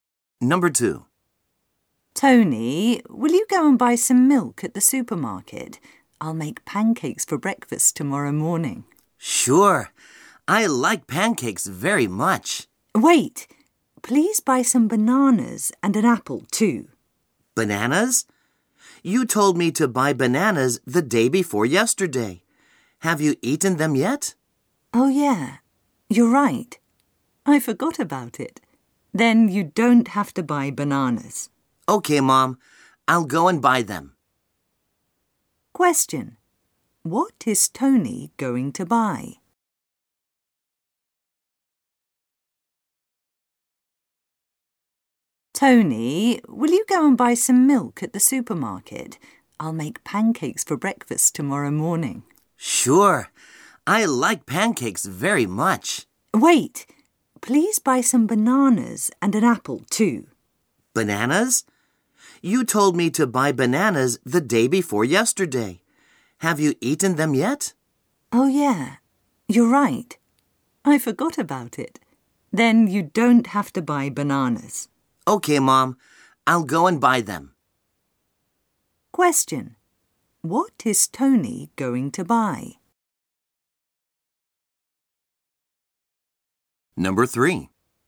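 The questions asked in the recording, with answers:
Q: What is Tony going to buy?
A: Some milk and an apple.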